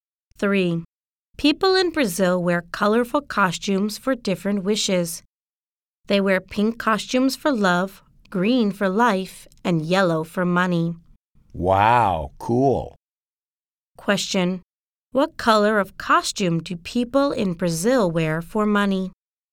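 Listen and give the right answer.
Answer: Yellow.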